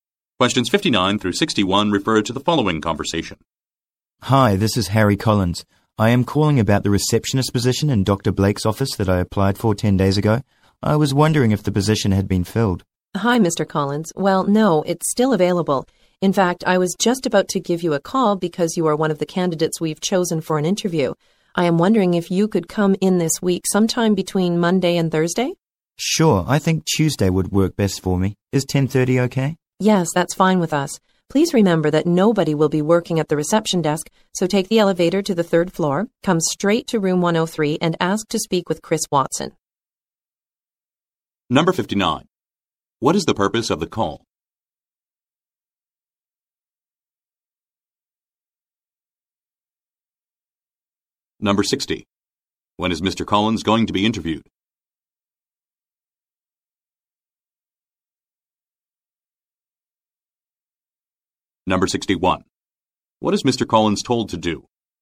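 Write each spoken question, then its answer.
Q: What is the purpose of the call?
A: To ask if the receptionist position has been filled

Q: When is Mr. Collins going to be interviewed?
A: Tuesday at 10:30

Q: What is Mr. Collins told to do?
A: Go to room 103 on the third floor and ask for Chris Watson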